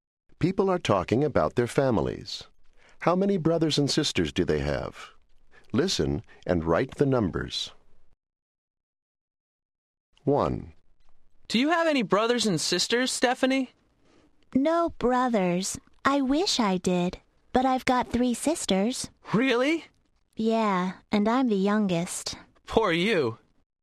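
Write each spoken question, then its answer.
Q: How many brothers and sisters do they have?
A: No brothers, 3 sisters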